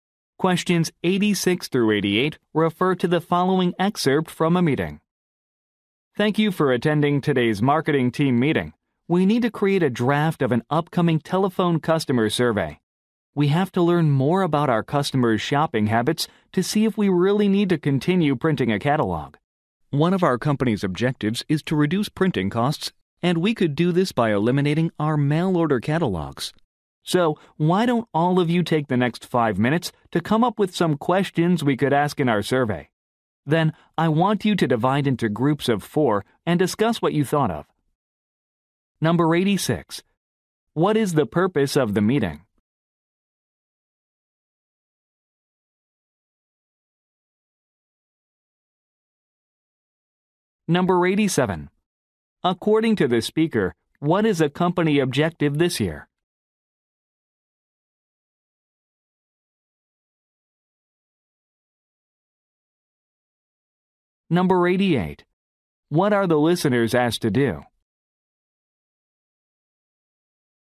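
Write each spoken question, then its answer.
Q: What is the purpose of the meeting?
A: To draft a telephone customer survey

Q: According to the speaker, what is a company objective this year?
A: Reducing printing costs

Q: What are the listeners asked to do?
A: Come up with survey questions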